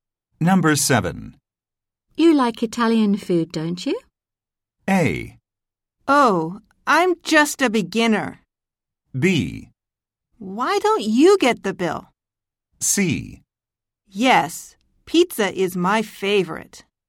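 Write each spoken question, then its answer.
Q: You like Italian food, don't you?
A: C: Yes, pizza is my favorite.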